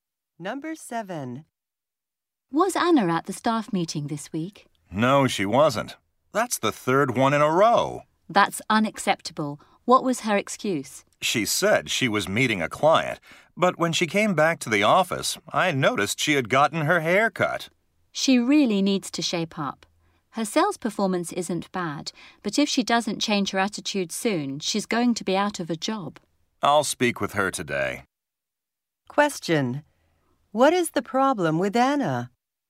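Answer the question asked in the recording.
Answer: She keeps missing staff meetings and has a bad attitude.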